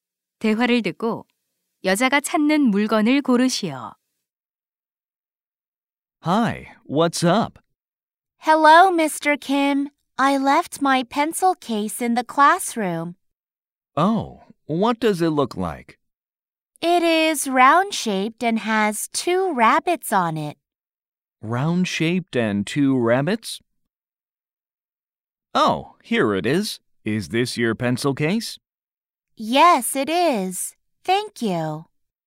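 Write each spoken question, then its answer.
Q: 대화를 듣고 여자가 찾는 물건을 고르시오.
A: 토끼 두 마리가 그려진 둥근 필통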